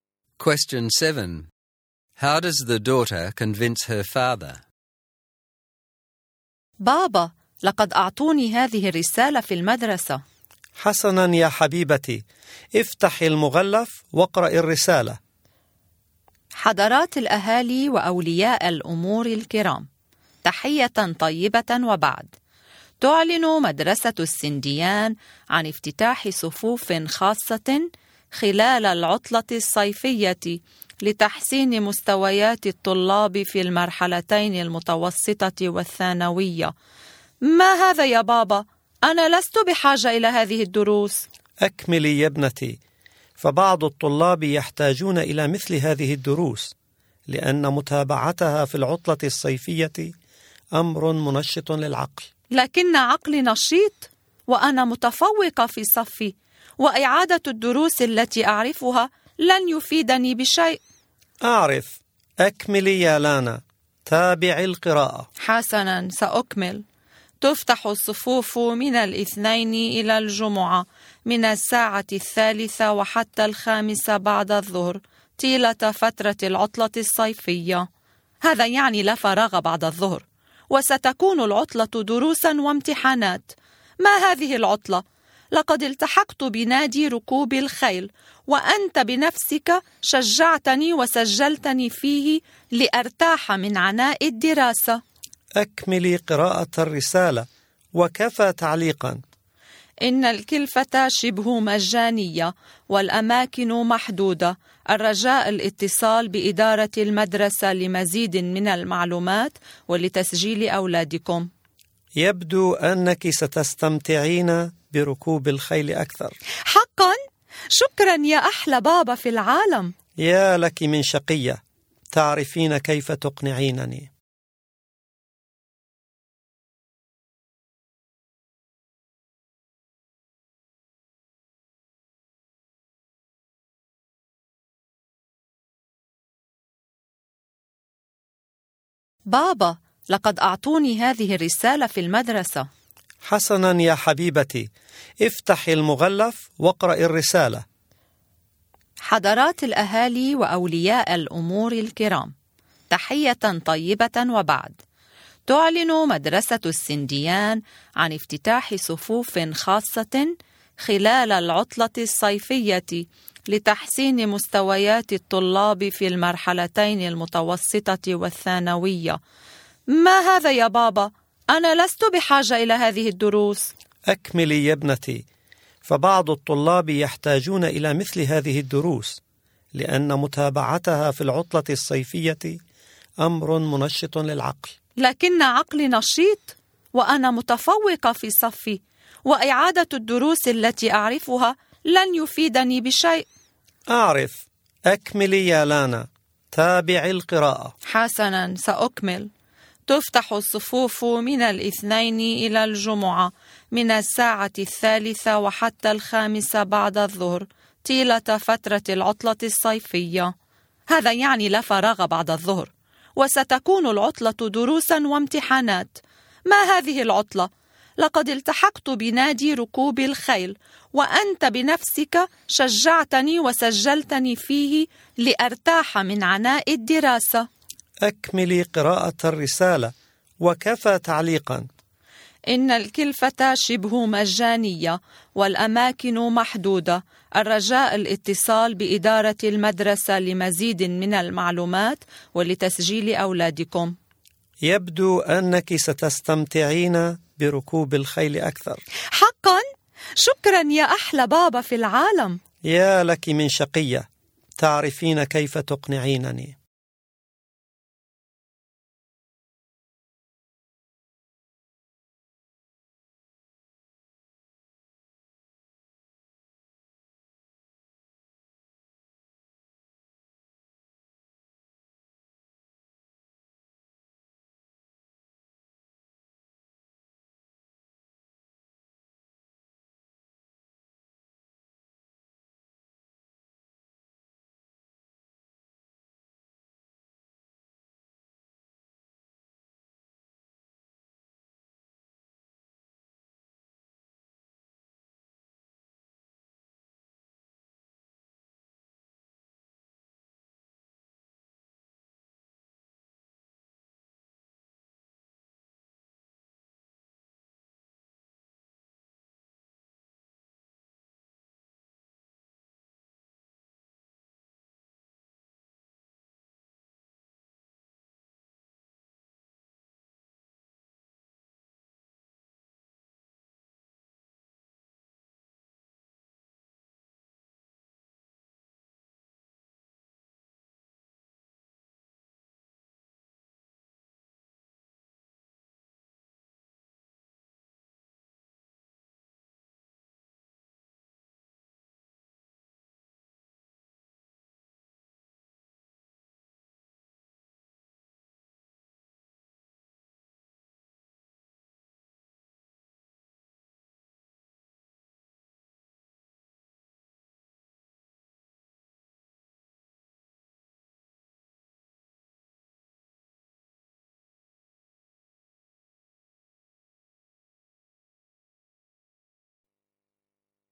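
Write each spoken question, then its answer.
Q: How does the daughter convince her father?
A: She says she is a top student and does not need the classes. She also reminds him that he encouraged her to join the horse-riding club and enrolled her in it so she could rest from studying.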